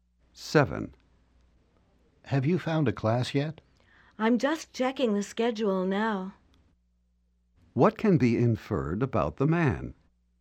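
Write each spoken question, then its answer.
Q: What can be inferred about the man?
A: He hasn't found a class yet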